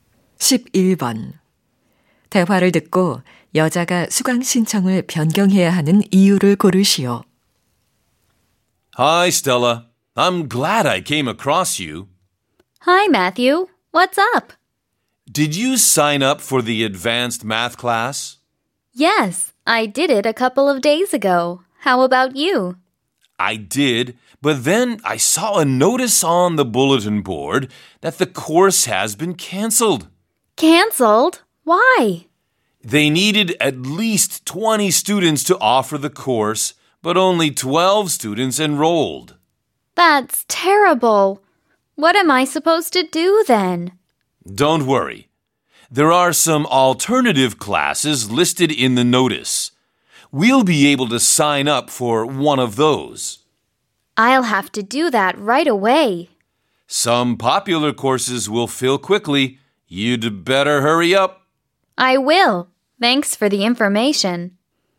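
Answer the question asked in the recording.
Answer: 수강 인원이 부족해 고급 수학 강좌가 폐강되어서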